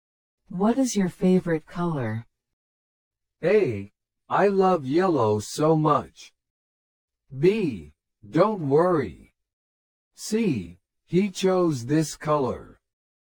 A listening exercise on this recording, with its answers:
What is your favorite color?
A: I love yellow so much.

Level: 初級者用